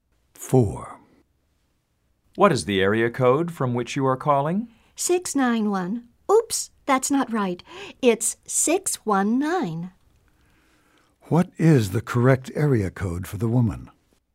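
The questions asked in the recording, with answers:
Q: What is the correct area code for the woman?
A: 619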